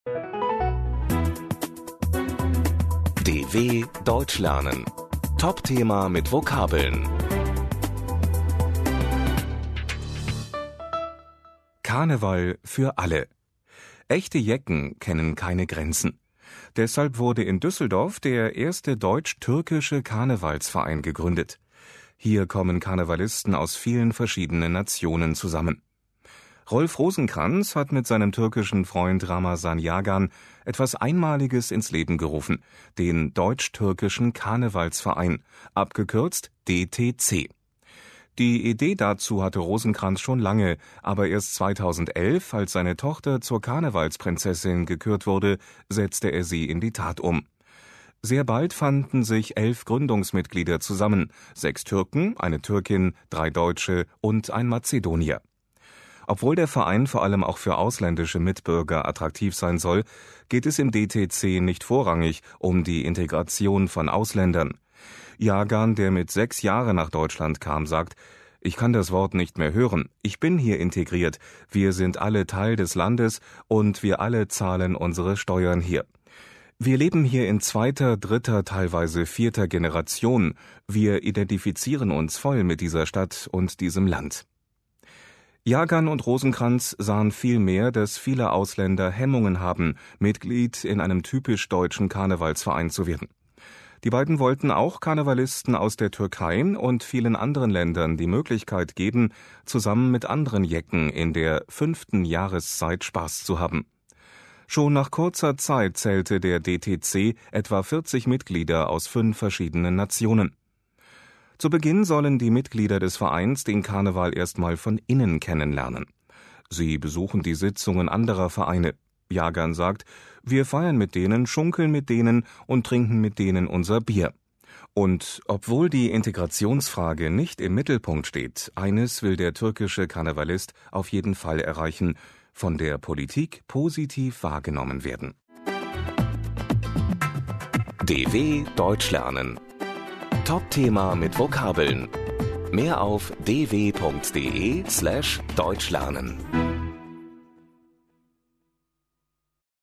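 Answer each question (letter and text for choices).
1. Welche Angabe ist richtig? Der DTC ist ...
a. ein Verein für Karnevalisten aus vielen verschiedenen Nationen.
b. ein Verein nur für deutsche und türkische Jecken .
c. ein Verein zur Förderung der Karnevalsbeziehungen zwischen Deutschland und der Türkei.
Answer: a. ein Verein für Karnevalisten aus vielen verschiedenen Nationen.

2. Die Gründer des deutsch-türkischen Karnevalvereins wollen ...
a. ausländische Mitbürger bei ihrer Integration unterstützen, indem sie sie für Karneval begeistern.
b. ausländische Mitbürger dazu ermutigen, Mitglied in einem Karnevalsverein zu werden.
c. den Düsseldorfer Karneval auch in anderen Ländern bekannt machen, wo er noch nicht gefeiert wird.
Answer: b. ausländische Mitbürger dazu ermutigen, Mitglied in einem Karnevalsverein zu werden.

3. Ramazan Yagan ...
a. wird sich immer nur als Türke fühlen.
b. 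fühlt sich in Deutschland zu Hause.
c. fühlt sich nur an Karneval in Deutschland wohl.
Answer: b. fühlt sich in Deutschland zu Hause.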